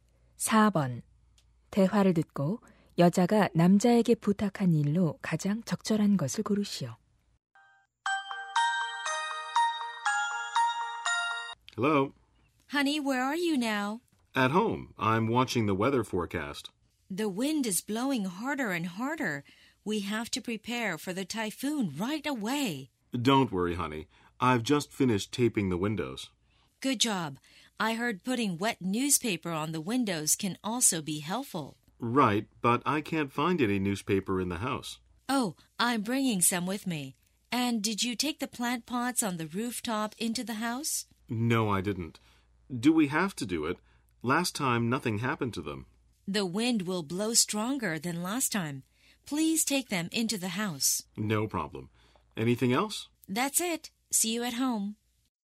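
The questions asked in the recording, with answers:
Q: 대화를 듣고 여자가 남자에게 부탁한 일로 가장 적절한 것을 고르시오.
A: 옥상의 화분을 집 안으로 들여놓기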